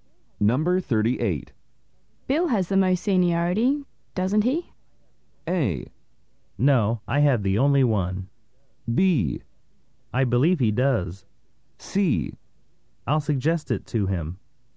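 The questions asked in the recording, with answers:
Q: Bill has the most seniority, doesn't he?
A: B: I believe he does.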